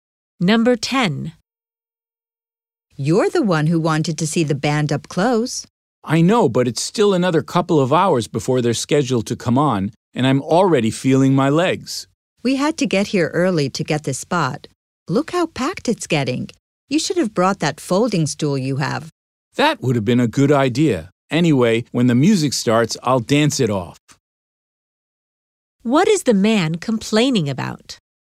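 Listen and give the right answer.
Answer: His legs are tired from standing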